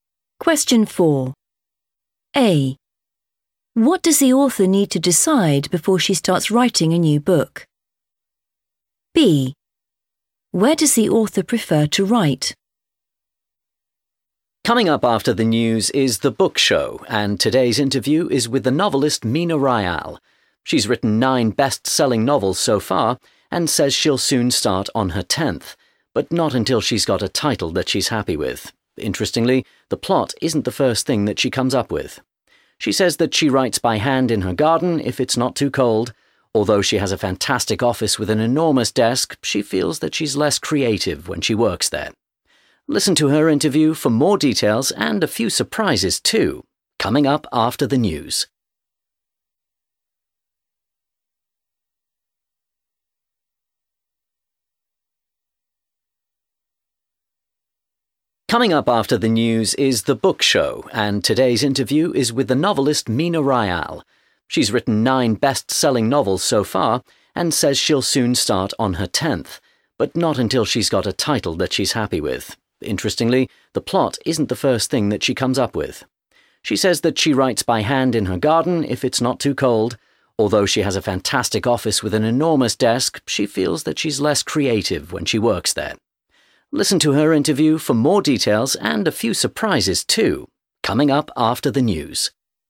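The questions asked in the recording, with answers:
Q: What does the author need to decide before she starts writing a new book?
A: the title

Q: Where does the author prefer to write?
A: in her garden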